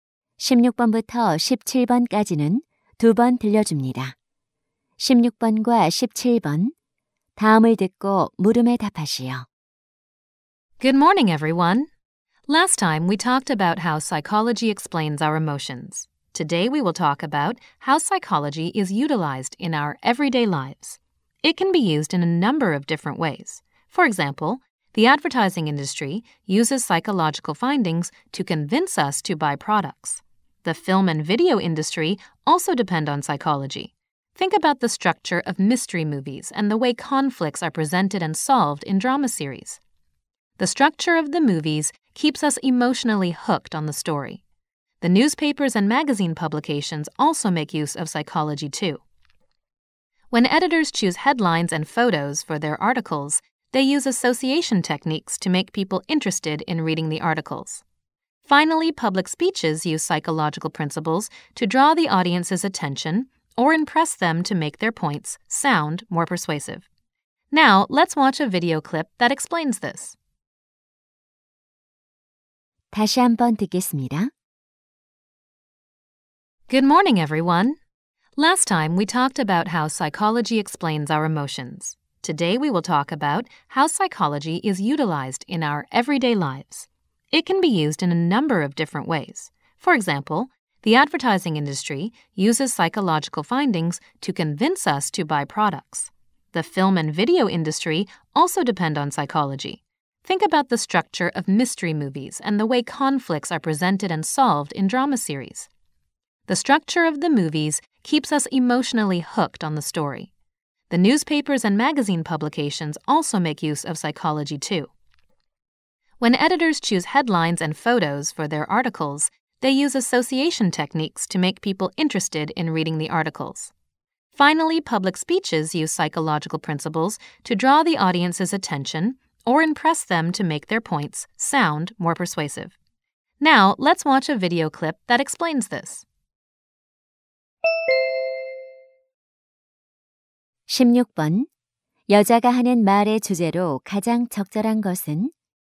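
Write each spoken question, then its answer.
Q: 여자가 하는 말의 주제로 가장 적절한 것은?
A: 일상생활에서 심리학이 활용되는 방식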